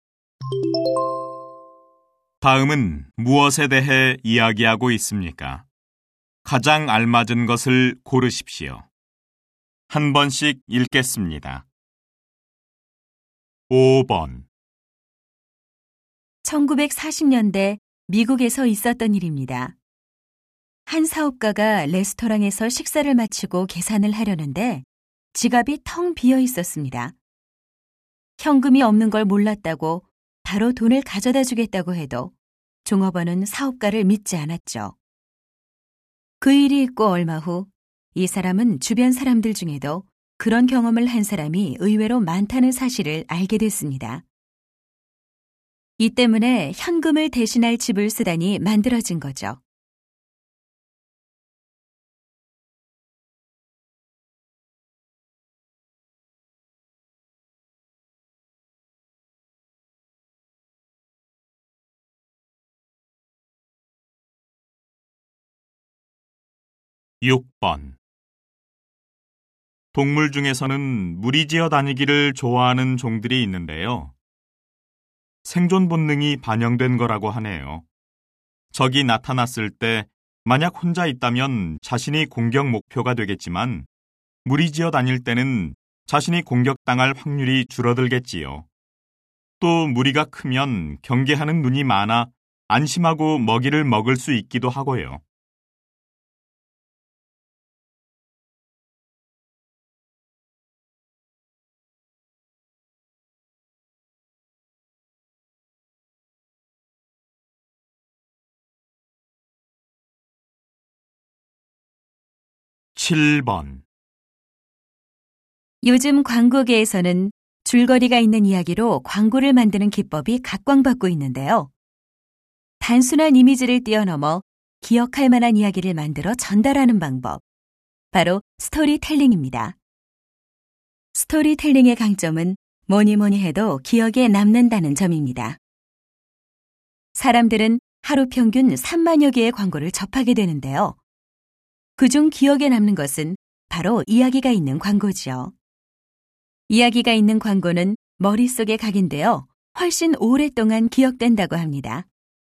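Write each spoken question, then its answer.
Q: 다음은 무엇에 대해 이야기하고 있습니까?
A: 신용카드(현금을 대신할 지불 수단)가 생겨난 계기

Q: 다음은 무엇에 대해 이야기하고 있습니까?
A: 동물이 무리 지어 다니는 이유

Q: 다음은 무엇에 대해 이야기하고 있습니까?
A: 스토리텔링 광고의 강점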